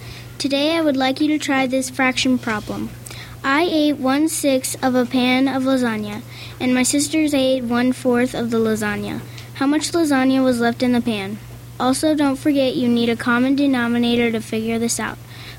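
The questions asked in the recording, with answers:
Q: How much lasagna was left in the pan?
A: 7/12 of the lasagna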